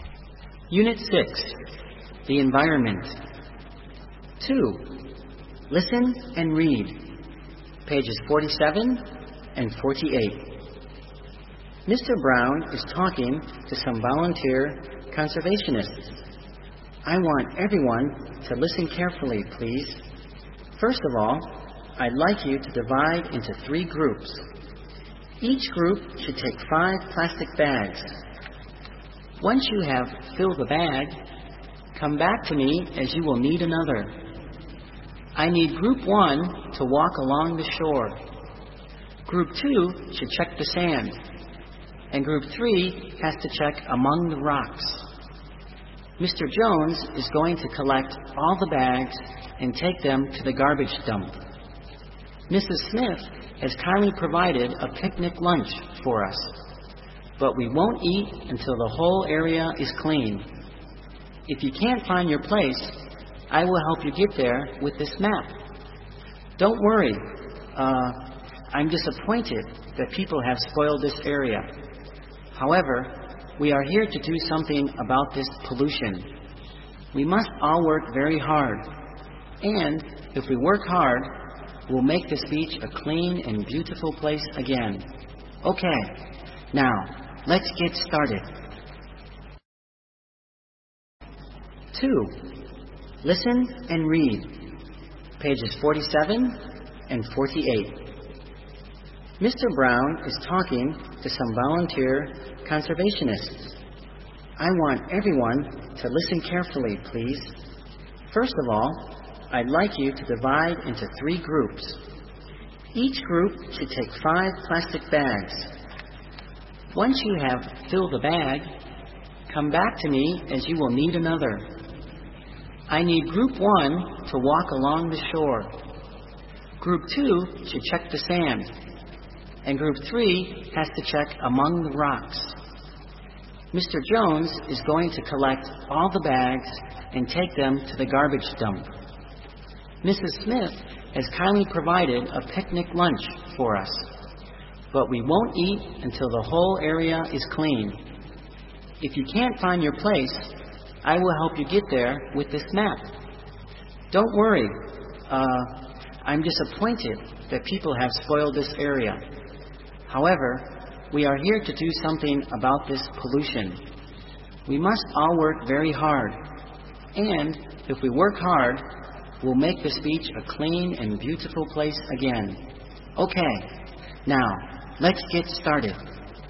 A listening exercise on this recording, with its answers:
b. Answer.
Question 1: Who is the speaker?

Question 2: Who is the listeners?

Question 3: Where are they?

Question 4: What are they going to do?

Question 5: What will they achieve if they work hard today?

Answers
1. Mr. Brown is the speaker.
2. All the others, volunteer conservationists, are the listeners.
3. They are on the beach/shore.
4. They are going to clean up the beach, collect garbage.
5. If they work hard, they'll make the spoiled dirty beach a clean and beautiful place again.

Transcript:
"I want everyone to listen carefully, please. First of all, I'd like you to divide into three groups. Each group should take five plastic bags. Once you have filled a bag, come back to me as you will need another. I need group one to walk along the shore. Group two should check the sand, and group three has to check among the rocks. Mr. Jones is going to collect all the bags and take them to the garbage dump. Mrs. Smith has kindly provided a picnic lunch for us, but we won't eat until the whole area is clean. If you can't find your place, I will help you get there with this map. Don't worry. uh ... I'm disappointed that people have spoiled this area. However, we are here to do something about this pollution. We must all work very hard. And. if we work hard, we'll make this beach a clean and beautiful place again. Now, let's get started."

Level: Tiếng Anh 9